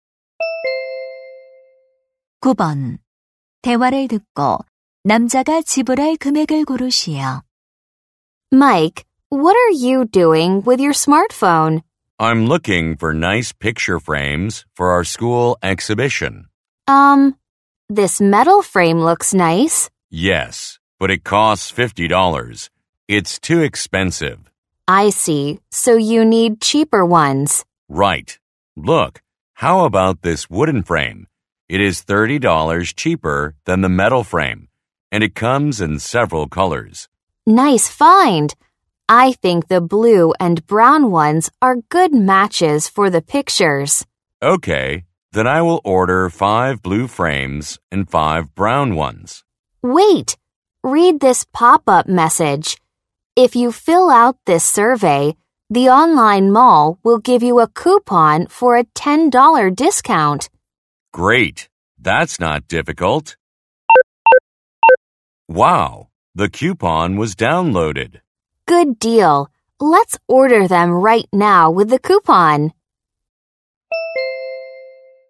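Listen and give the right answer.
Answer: $190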